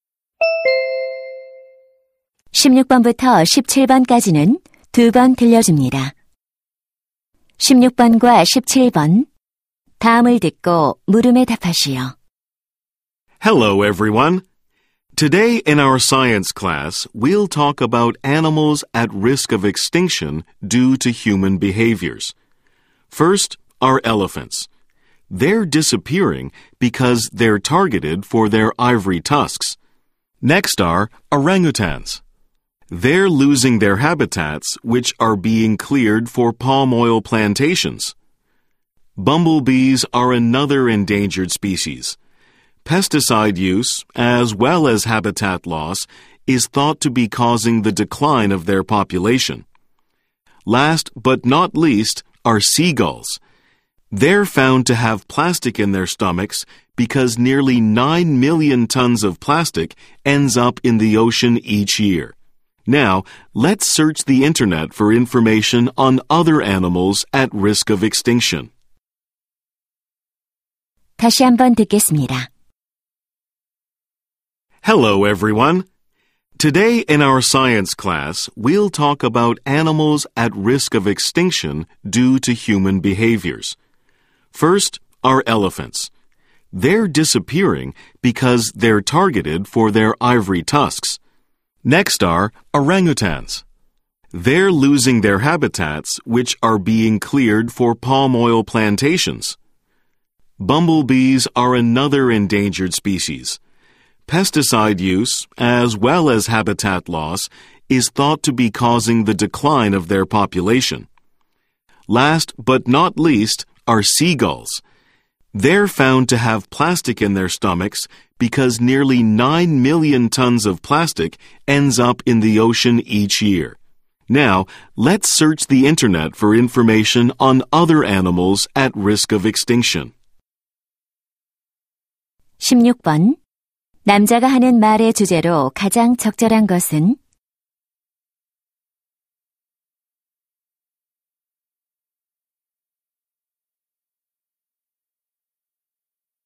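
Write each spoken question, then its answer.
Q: 남자가 하는 말의 주제로 가장 적절한 것은?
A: 인간의 행동 때문에 멸종 위기에 처한 동물들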